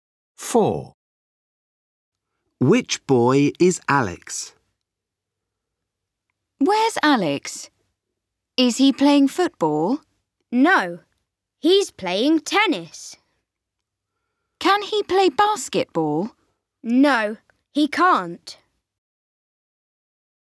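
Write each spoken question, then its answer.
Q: Which boy is Alex?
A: The boy playing tennis.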